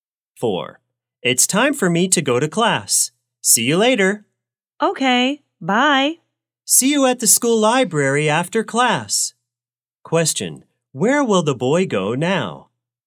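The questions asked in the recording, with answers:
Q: Question, where will the boy go now?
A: To class.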